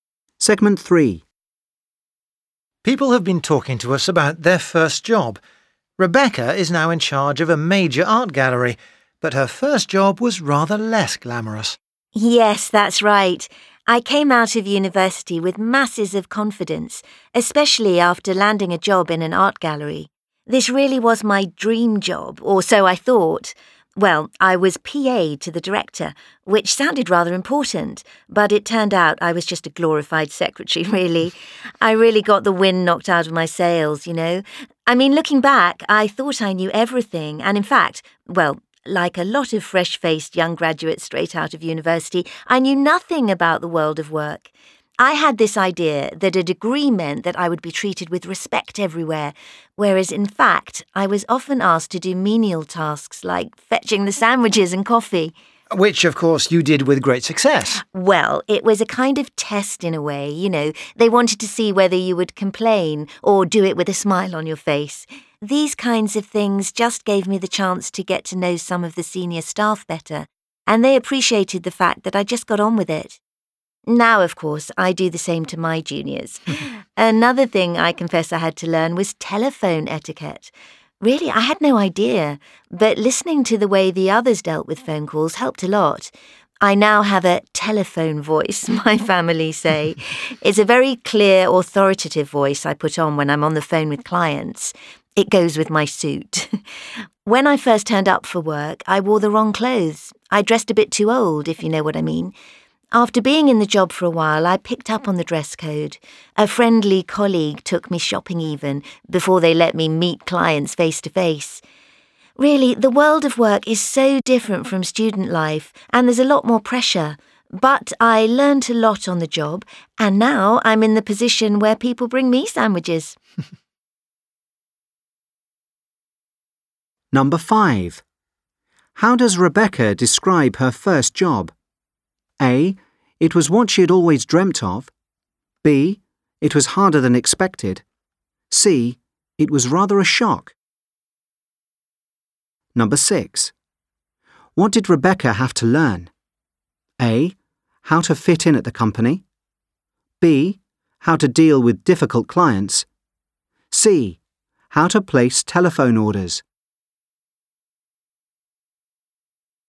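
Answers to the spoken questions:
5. C: It was rather a shock.
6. A: How to fit in at the company.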